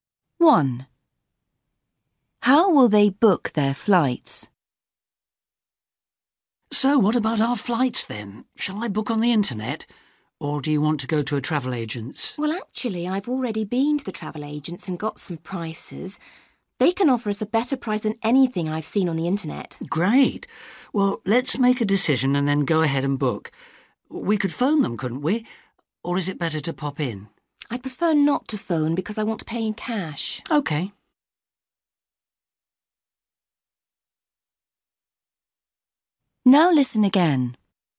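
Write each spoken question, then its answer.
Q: How will they book their flights?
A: In person at the travel agent's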